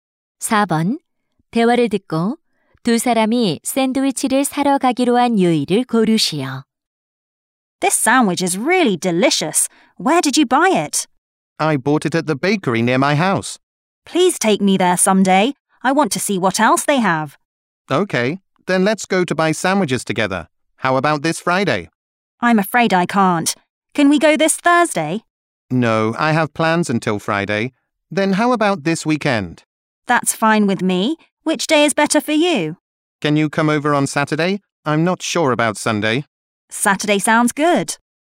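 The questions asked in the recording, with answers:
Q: 대화를 듣고 두 사람이 샌드위치를 사러 가기로 한 요일을 고르시오.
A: 토요일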